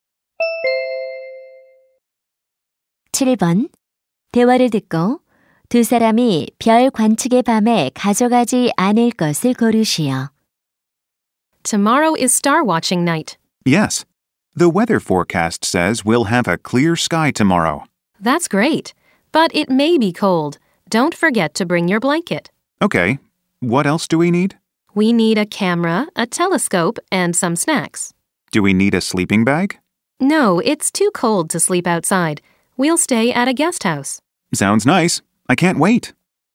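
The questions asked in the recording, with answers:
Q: 두 사람이 별 관측의 밤에 가져가지 않을 것을 고르시오.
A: 침낭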